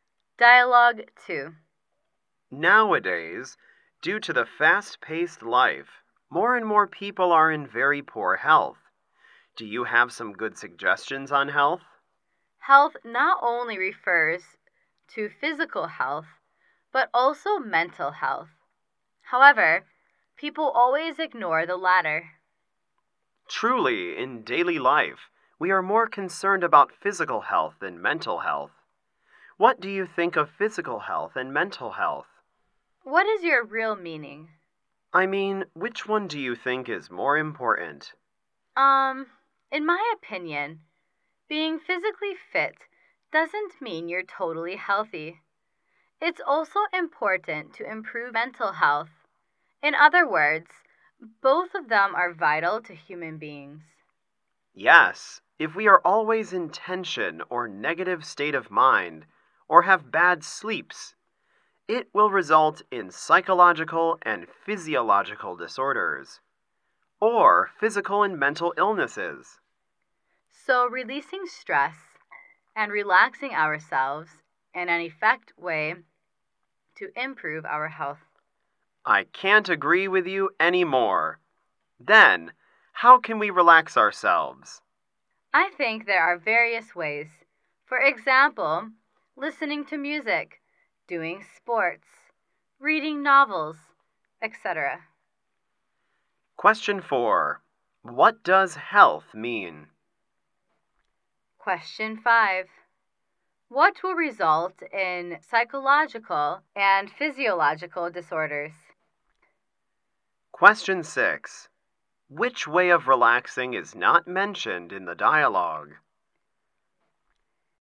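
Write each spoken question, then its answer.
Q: What does health mean?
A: Both physical health and mental health.

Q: What will result in psychological and physiological disorders?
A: Always being tense or in a negative state of mind, or sleeping badly.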